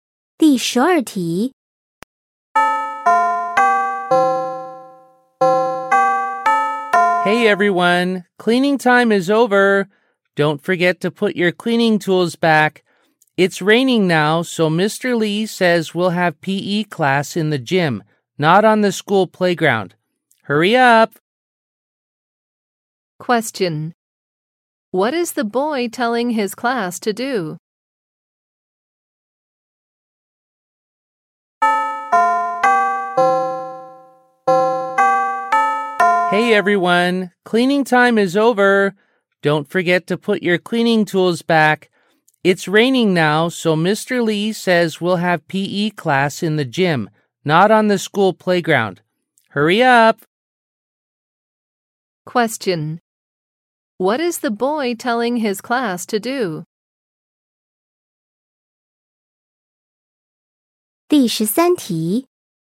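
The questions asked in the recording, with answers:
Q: What is the boy telling his class to do?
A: Go to the gym for PE class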